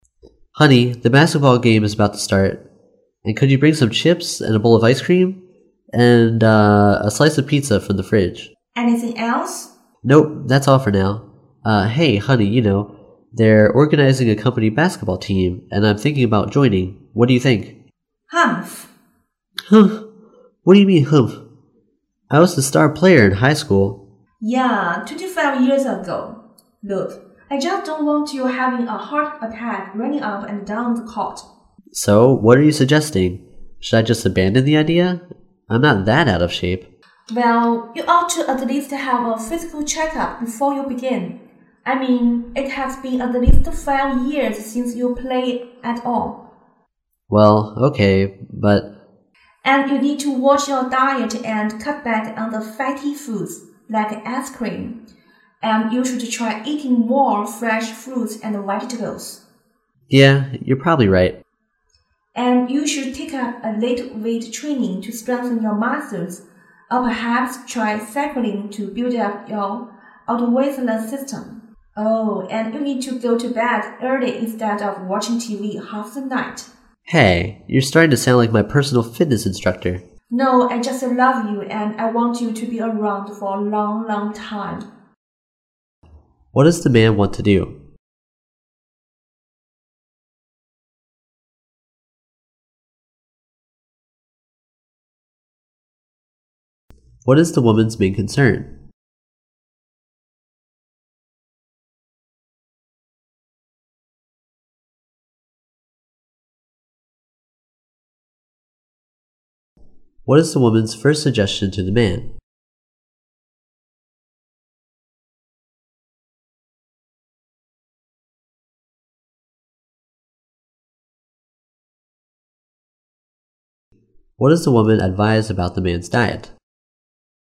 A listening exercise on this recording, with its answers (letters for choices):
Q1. What is the woman's main concern?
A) She is worried the man will spend too much time away from home.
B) She is afraid the man will become a fitness freak.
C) She is concerned about the man's health.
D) She is worried the man is not a professional player.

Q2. What is the woman's first suggestion to the man?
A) He should see a doctor.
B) Her husband should start with a light workout.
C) Her husband needs to visit a fitness trainer.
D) Her husband should try cycling to build up his cardiovascular system.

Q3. What does the woman advise about the man's diet?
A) He should consume less salt.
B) He should add more protein to his diet.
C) He should drink more dairy.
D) He should eat less fatty foods.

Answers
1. C
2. A
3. D

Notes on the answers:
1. 细节题。根据I just don't want you having a heart attack running up and down the court. 可知,妻子担心丈夫身体吃不消大运动量。因此,正确答案为C。
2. 细节题。根据you ought to at least have a physical before you begin. 可知妻子建议丈夫在运动之前做一次体检,征询医生的意见。因此,正确答案为A。

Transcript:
[听力原文] M: Honey, the basketball game is about to start. And could you bring some chips and a bowl of ice cream? And...Uh...a slice of pizza from the fridge. W: Anything else? M: Nope, that's all for now. Hey, honey, you know, they're organizing a company basketball team, and I'm thinking about joining. What do you think? W: Humph. M: "Humph!" What do you mean "Humph?" I was the star player in high school. W: Yeah, twenty-five years ago. Look, I just don't want you having a heart attack running up and down the court. M: So, what are you suggesting? Should I just abandon the idea? I'm not that out of shape. W: Well ... you ought to at least have a physical before you begin. I mean, it has been at least five years since you played at all. M: Well, okay, but ... W: And you need to watch your diet and cut back on the fatty foods, like ice cream. And you should try eating more fresh fruits and vegetables. M: Yeah, you're probably right. W: And you should take up a little weight training to strengthen your muscles or perhaps try cycling to build up your cardiovascular system. Oh, and you need to go to bed early instead of watching TV half the night. M: Hey, you're starting to sound like my personal fitness instructor! W: No, I just love you, and I want you to be around for a long, long time.
What does the man want to do?